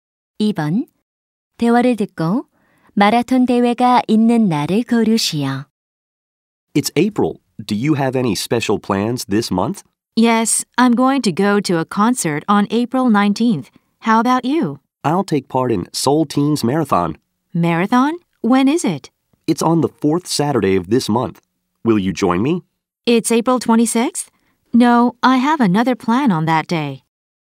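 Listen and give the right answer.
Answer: 4월 26일 (넷째 토요일)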